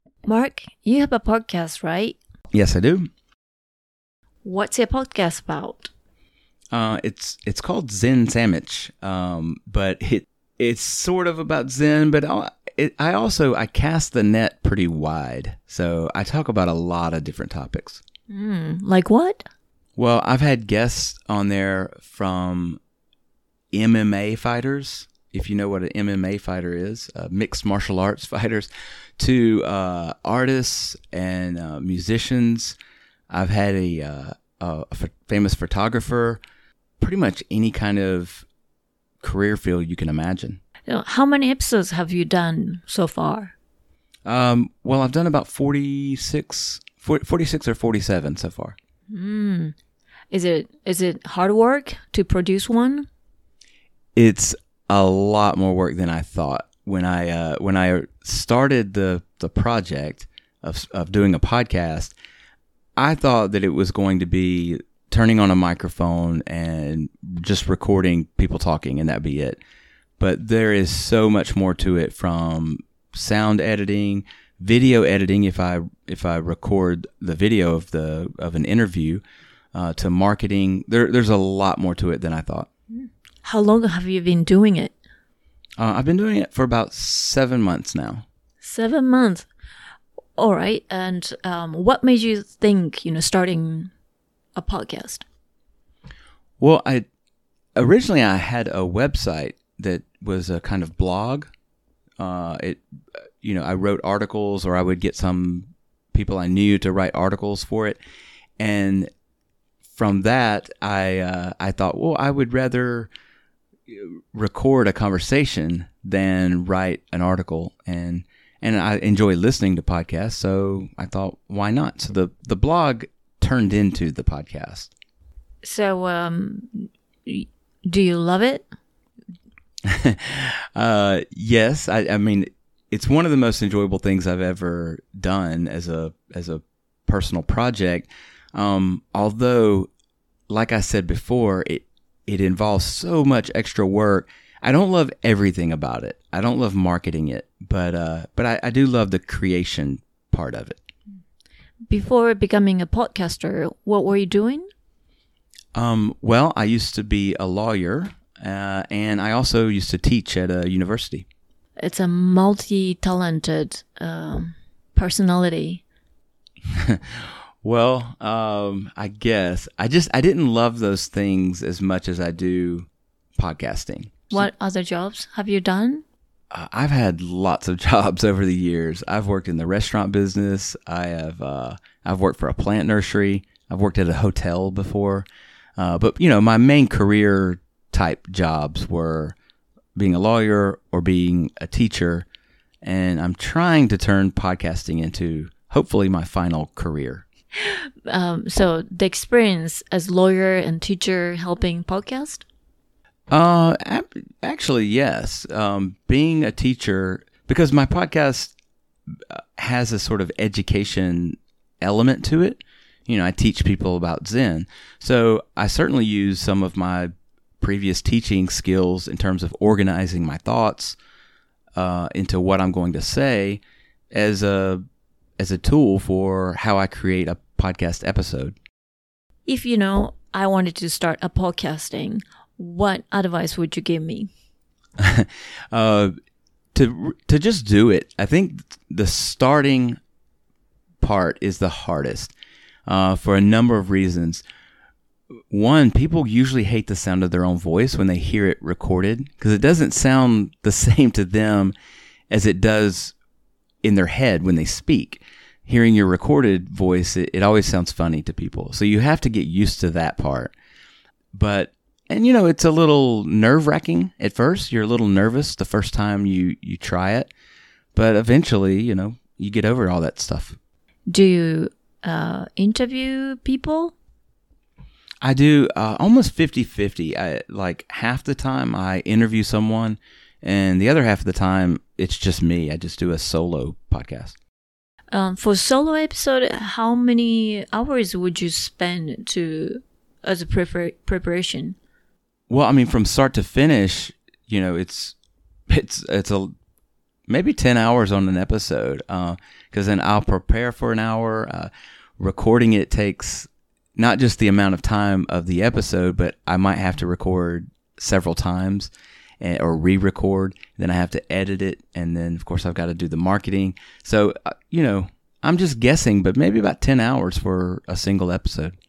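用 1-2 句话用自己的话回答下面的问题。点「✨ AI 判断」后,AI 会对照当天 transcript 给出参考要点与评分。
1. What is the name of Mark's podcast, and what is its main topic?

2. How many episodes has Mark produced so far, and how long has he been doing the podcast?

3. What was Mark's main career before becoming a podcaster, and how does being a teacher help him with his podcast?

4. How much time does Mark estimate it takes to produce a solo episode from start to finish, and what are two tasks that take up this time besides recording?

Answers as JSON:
{"1": "Zen Sammich; it's about Zen but covers many different topics.", "2": "About 46 or 47 episodes, over about seven months.", "3": "He was a lawyer and a university teacher; teaching skills help him organize his thoughts, since the podcast teaches people about Zen.", "4": "About ten hours; preparing, editing and marketing."}

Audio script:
So I talk about a lot of different topics.
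Like what?
Mark
Well, I've had guests on there from MMA fighters. If you know what an MMA fighter is, mixed martial arts fighters to artists and musicians. I've had a famous photographer, pretty much any kind of career field you can imagine.
Yeah. How many episodes have you done so far?
Mark
Well, I've done about 46 or 47 so far.
Is it hard work to produce one?
Mark
It's a lot more work than I thought. When I started the project of doing a podcast, I thought that it was going to be turning on a microphone and just recording people, talking, and that'd be it. But there is so much more to it from sound editing, video editing if I record the video of an interview, to marketing there. There's a lot more to it than I thought.
How long have you been doing it?
Mark
I've been doing it for about seven months now.
Seven months. All right. And what made you think, starting a podcast?
Mark
Well, originally I had a website that was a blog. 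I wrote articles or I would get some people I knew to write articles for it. And from that I thought, well, I would rather record a conversation than write an article and I enjoy listening to podcasts. So I thought, why not? So the blog turned into the podcast.
So do you love it?
Mark
Yes. I mean, it's one of the most enjoyable things I've ever done as a personal project. Although, like I said before, it involves so much extra work. I don't love everything about it. I don't love marketing it, but I do love the creation part of it.
Before becoming a podcaster. What were you doing?
Mark
Well, I used to be a lawyer and I also used to teach at a university.
It's a multi-talented personality.
Mark
Well, I guess. I just didn't love those things as much as I do podcasting.
So what other jobs have you done?
Mark
I've had lots of jobs over the years. I've worked in the restaurant business. I've worked for a plant nursery. 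I've worked at a hotel before, but my main career type jobs were being a lawyer or being a teacher. And I'm trying to turn podcasting into hopefully my final career.
So the experience as lawyer and teacher helping podcast?
Mark
Actually yes. Being a teacher, because my podcast has a education element to it. I teach people about Zen. So I certainly use some of my previous teaching skills in terms of organizing my thoughts into what I'm going to say as a tool for how I create a podcast episode.
If I wanted to start a podcasting, what advice would you give me?
Mark
To just do it. I think the starting part is the hardest for a number of reasons. One, people usually hate the sound of their own voice when they hear it recorded. Because it doesn't sound the same to them as it does in their head when they speak. Hearing your recorded voice, it always sounds funny to people. So you have to get used to that part, and it's a little nerve wracking at first. 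You're a little nervous the first time you try it, but eventually, you get over all that stuff.
Do you interview people?
Mark
I do, almost 50/50. Half the time, I interview someone and the other half of the time, it's just me. I just do a solo podcast.
For solo episode. How many hours would you spend to as a preparation?
Mark
Well, I mean, from start to finish, it's maybe ten hours on an episode, because then I'll prepare for an hour, recording it takes not just the amount of time of the episode, but I might have to record several times or rerecord, then I have to edit it and then of course I've got to do the marketing.
MarkWell, I mean, from start to finish, it's maybe ten hours on an episode, because then I'll prepare for an hour, recording it takes not just the amount of time of the episode, but I might have to record several times or rerecord, then I have to edit it and then of course I've got to do the marketing. 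So I'm just guessing, but maybe about ten hours for a single episode.

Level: CEFRB2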